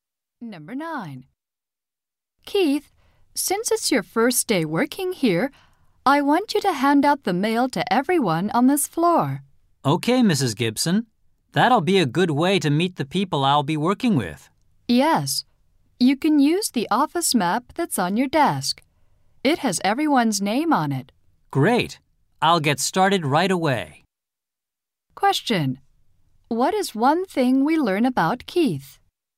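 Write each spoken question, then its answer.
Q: What is one thing we learn about Keith?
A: It is his first day working there.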